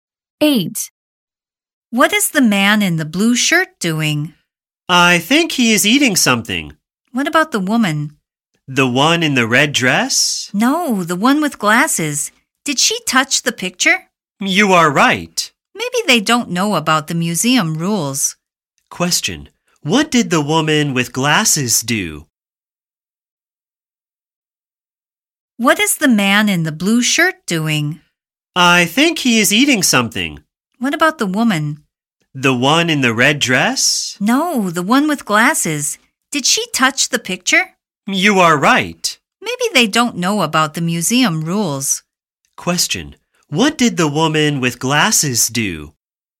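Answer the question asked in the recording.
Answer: She touched the picture.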